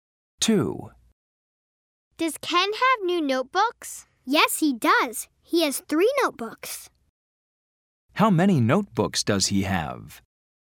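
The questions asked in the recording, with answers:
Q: How many notebooks does he have?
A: 3 notebooks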